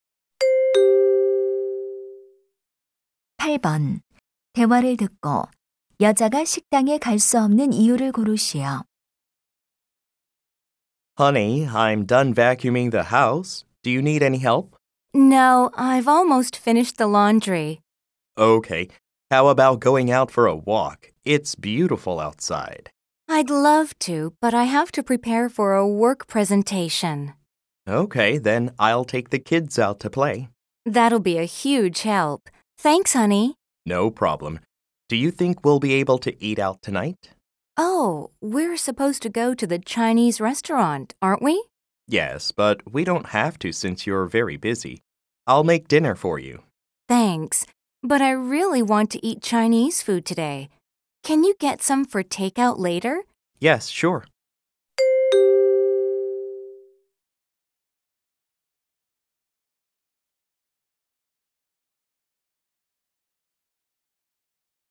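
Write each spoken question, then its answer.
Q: 대화를 듣고 여자가 식당에 갈 수 없는 이유를 고르시오.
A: 업무 발표를 준비해야 해서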